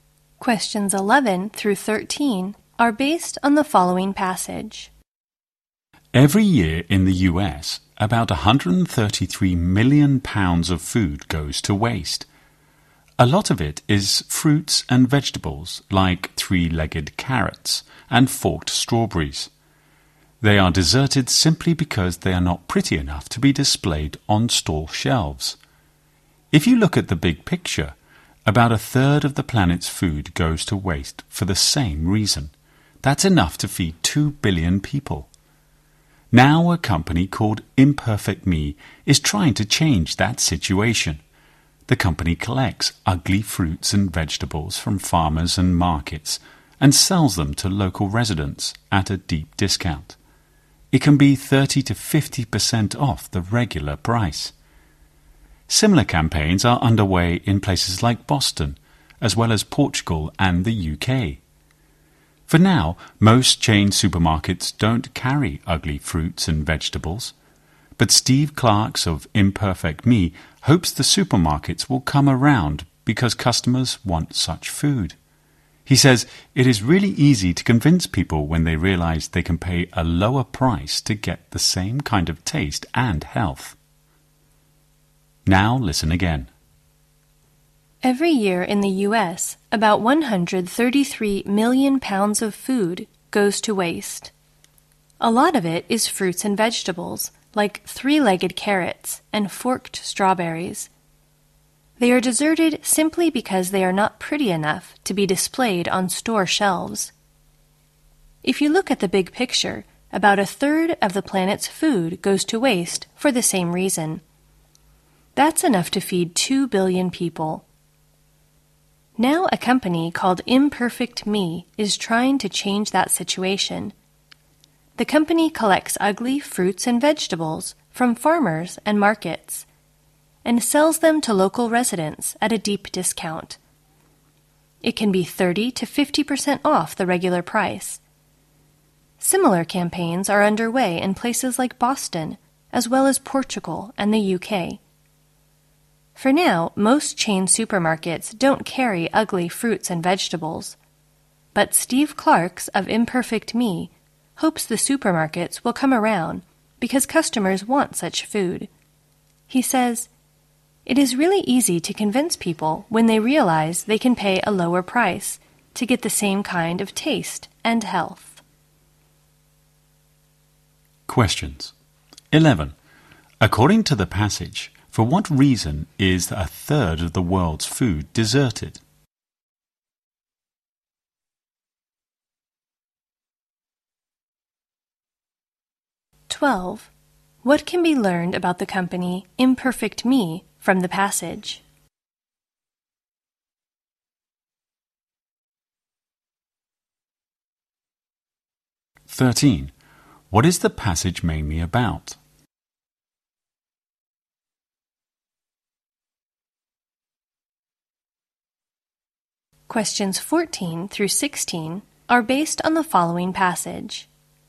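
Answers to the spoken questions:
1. It is not pretty enough to be displayed on store shelves
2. It sells ugly fruits and vegetables at a deep discount
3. Selling ugly fruits and vegetables to reduce food waste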